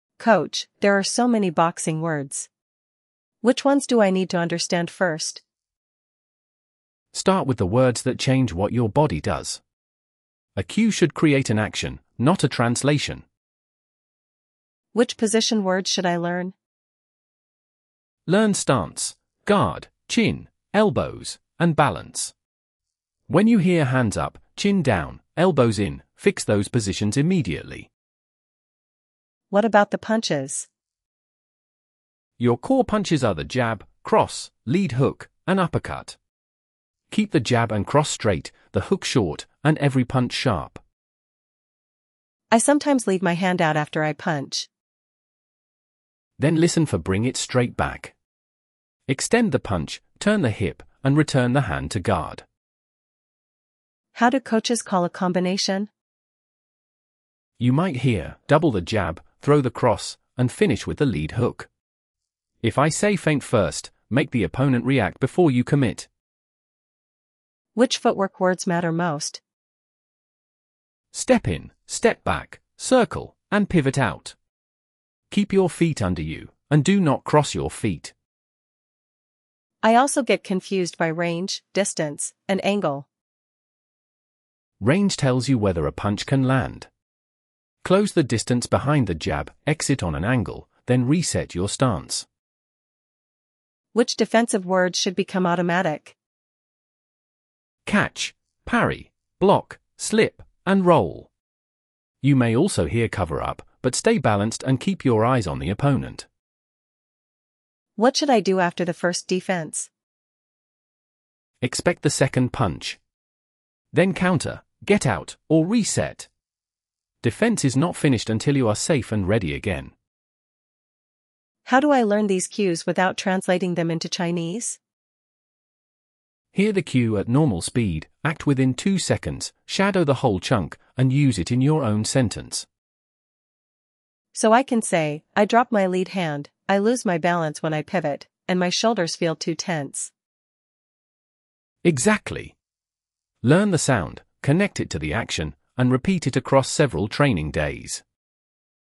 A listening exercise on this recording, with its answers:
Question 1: Hands up, chin down, ______ in.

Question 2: Bring it straight ______.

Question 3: Keep your feet ______ you.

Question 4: Close the distance behind the ______.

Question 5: Expect the second ______.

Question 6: Act within two ______.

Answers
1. elbows
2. back
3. under
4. jab
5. punch
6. seconds